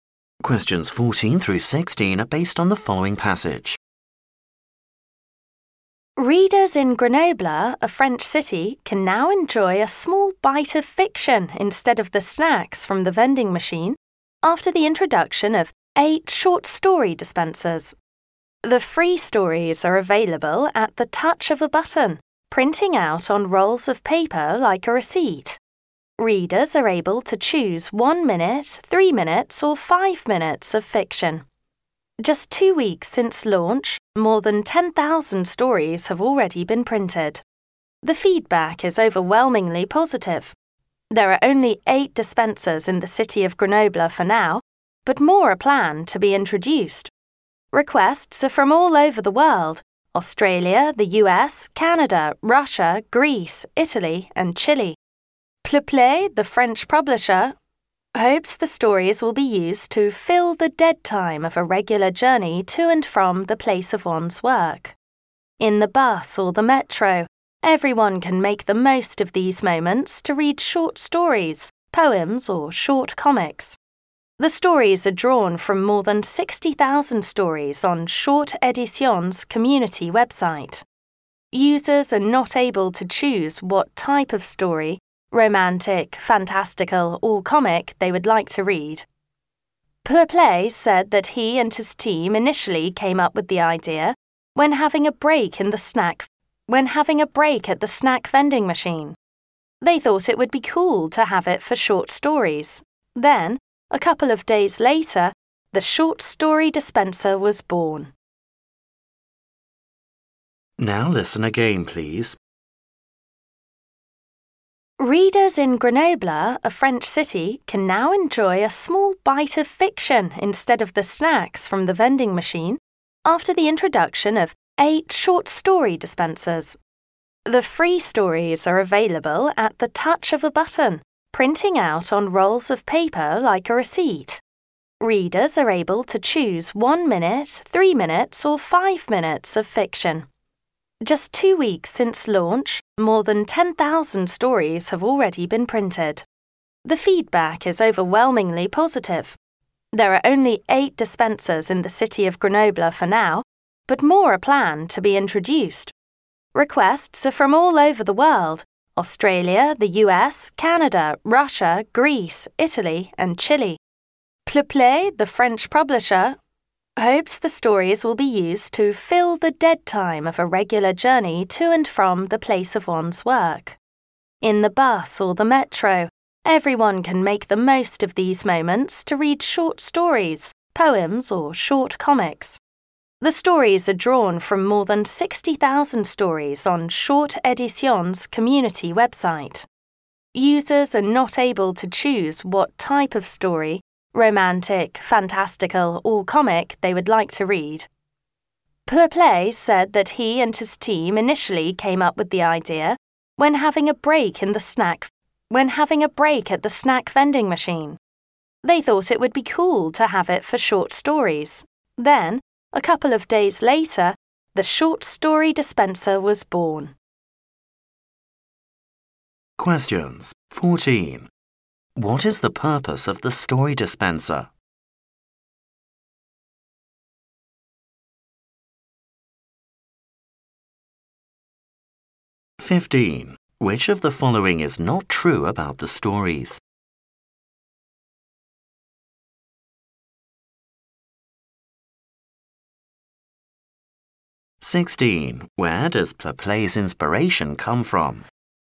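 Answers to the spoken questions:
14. To fill the dead time of commuting journeys
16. A break at the snack vending machine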